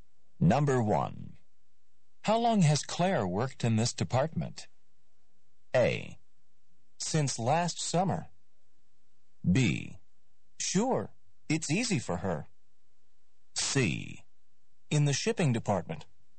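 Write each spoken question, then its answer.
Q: How long has Claire worked in this department?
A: A: Since last summer.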